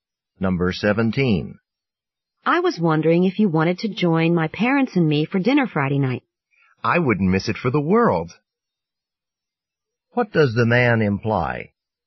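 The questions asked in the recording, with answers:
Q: What does the man imply?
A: He will definitely come to dinner.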